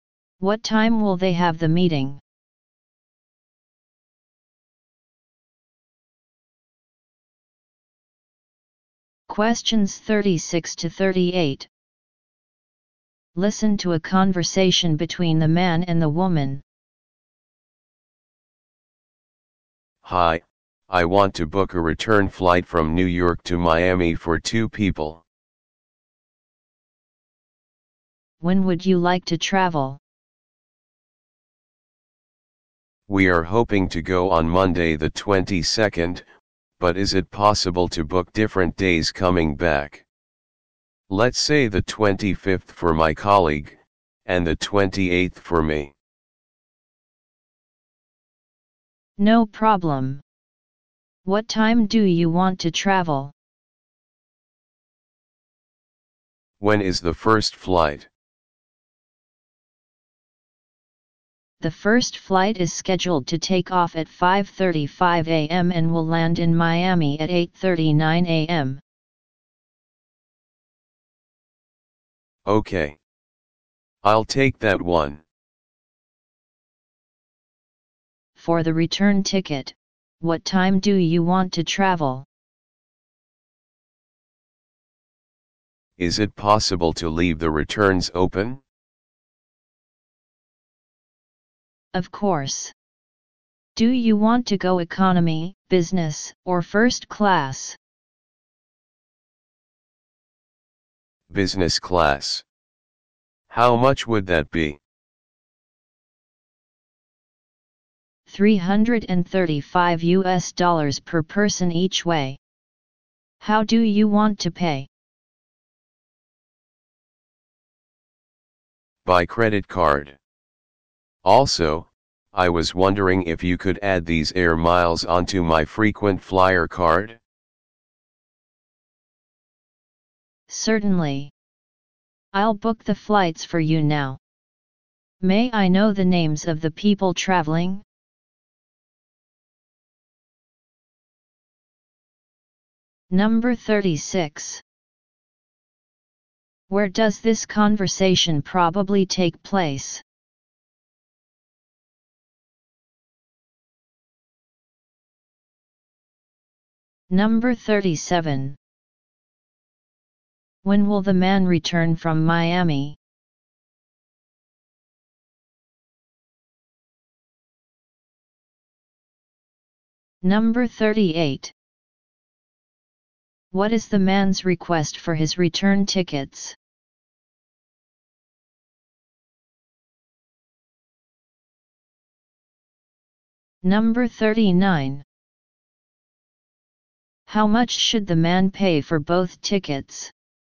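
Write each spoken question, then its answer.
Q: What is the man's request for his return tickets?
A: To leave the returns open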